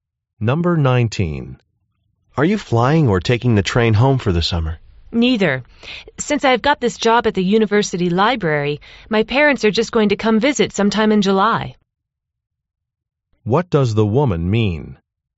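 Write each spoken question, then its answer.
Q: What does the woman mean?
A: She's staying at the university for the summer to work.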